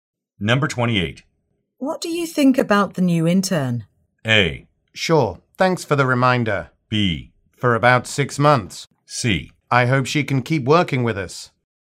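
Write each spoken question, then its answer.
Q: What do you think about the new intern?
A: C: I hope she can keep working with us.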